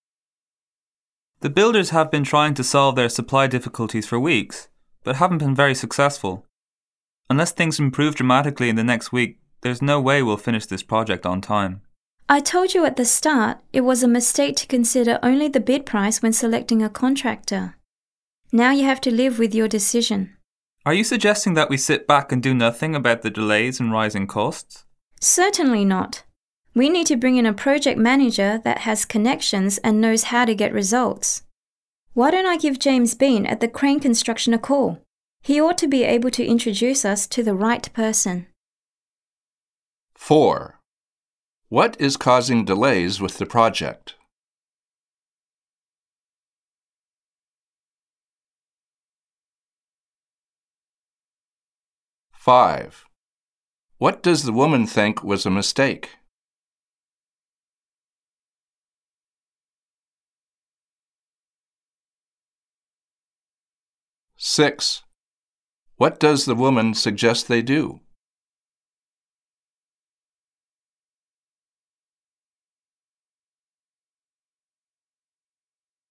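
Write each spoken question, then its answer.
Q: What is causing delays with the project?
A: The builders' supply difficulties

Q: What does the woman think was a mistake?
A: Choosing a contractor based only on the bid price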